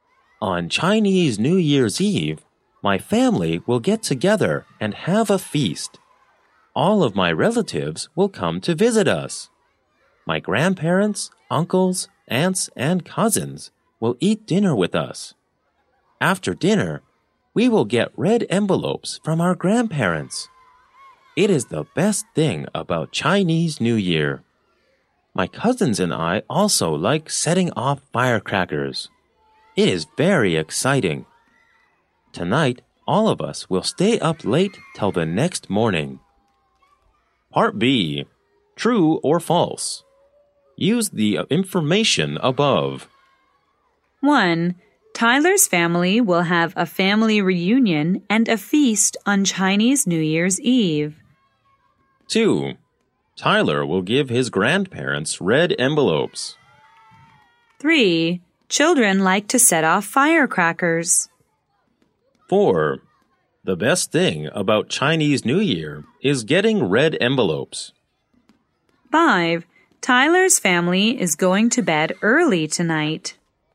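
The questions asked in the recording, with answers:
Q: Tyler's family will have a family reunion and a feast on Chinese New Year's Eve.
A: True

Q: Tyler will give his grandparents red envelopes.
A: False

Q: Children like to set off firecrackers.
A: True

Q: The best thing about Chinese New Year is getting red envelopes.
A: True

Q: Tyler's family is going to bed early tonight.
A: False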